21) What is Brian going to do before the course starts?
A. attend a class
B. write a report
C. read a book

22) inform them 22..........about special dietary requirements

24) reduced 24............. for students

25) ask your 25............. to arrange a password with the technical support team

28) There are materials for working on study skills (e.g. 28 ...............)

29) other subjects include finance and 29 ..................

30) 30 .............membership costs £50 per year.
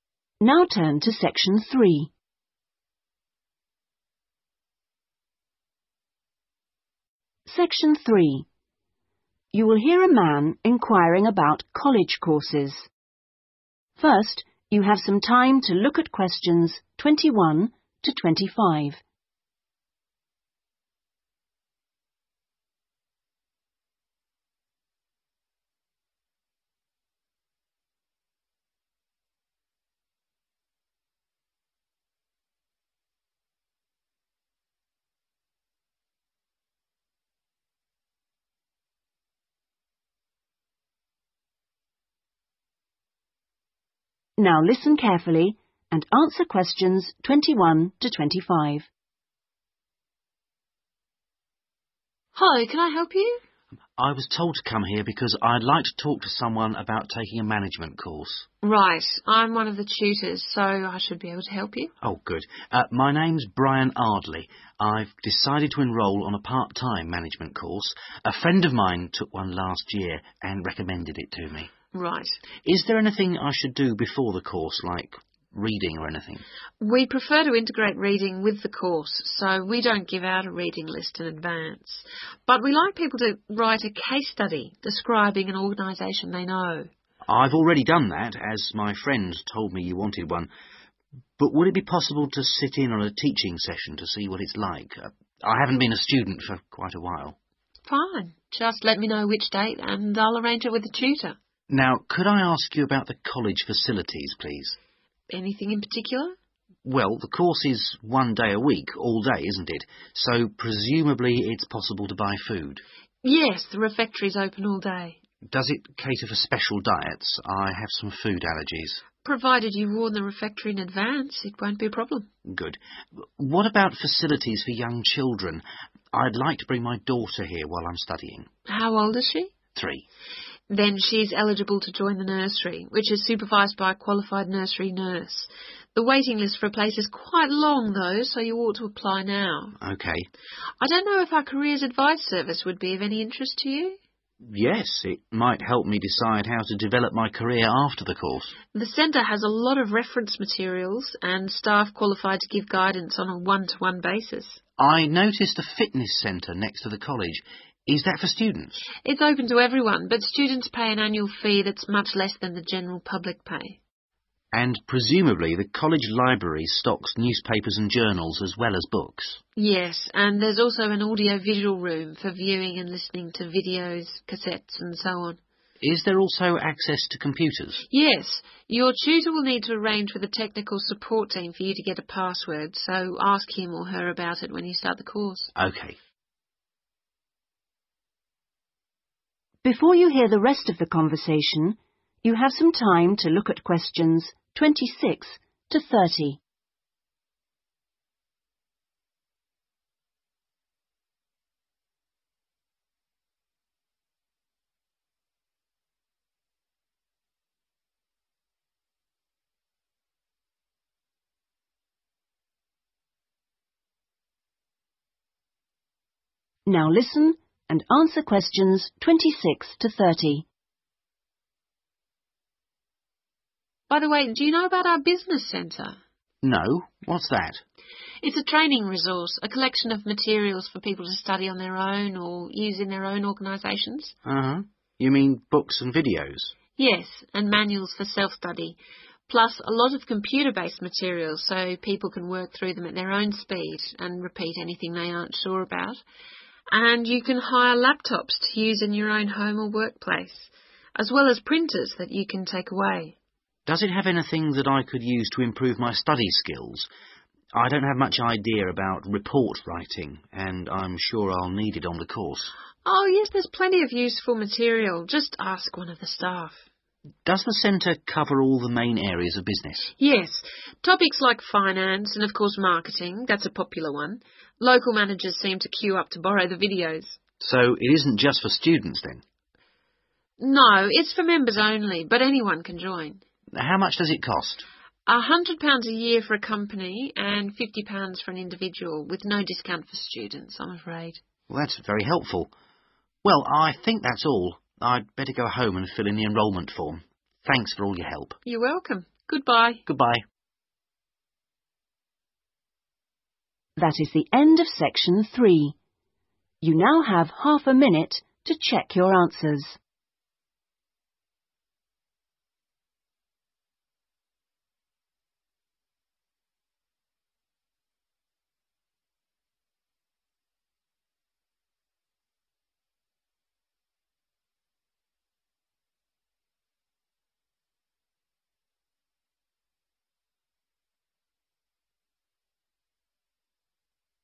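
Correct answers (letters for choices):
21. A
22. in advance
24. annual fee
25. tutor
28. report writing
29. marketing
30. individual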